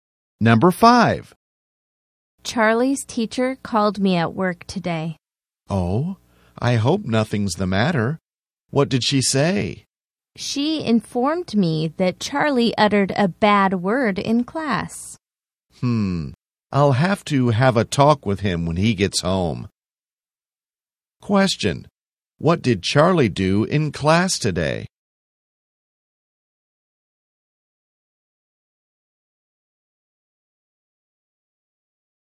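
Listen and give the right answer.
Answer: He said a bad word.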